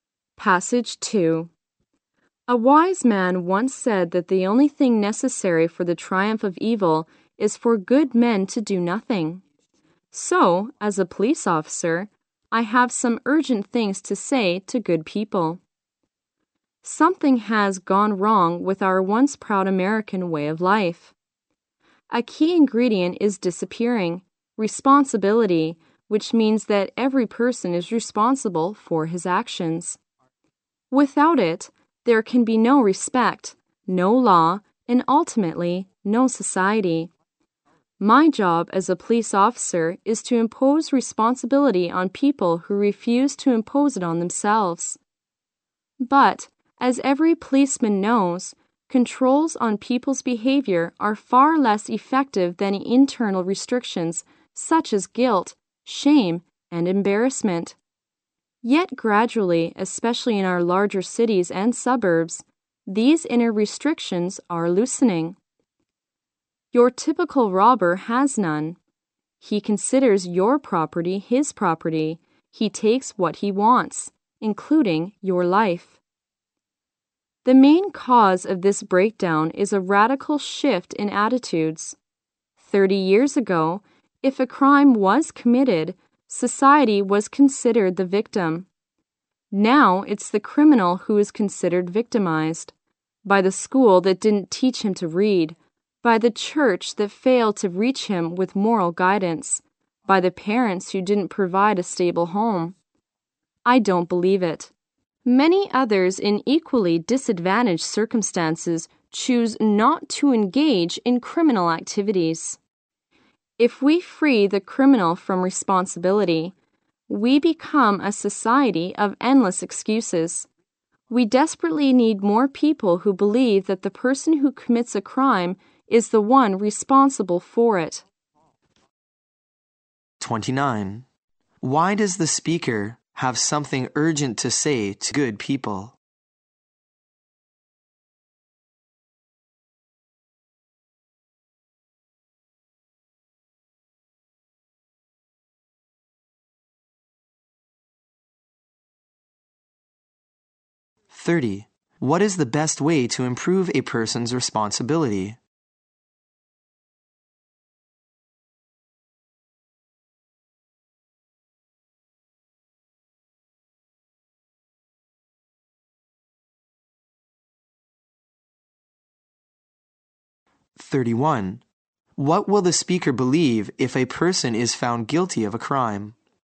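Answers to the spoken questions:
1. Responsibility is disappearing from American life
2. Internal restrictions such as guilt, shame and embarrassment
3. The person who commits the crime is responsible for it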